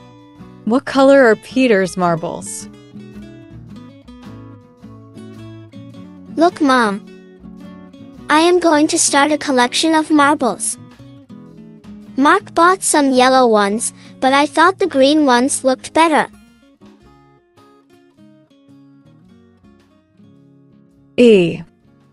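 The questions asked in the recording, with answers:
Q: What color are Peter's marbles?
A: Green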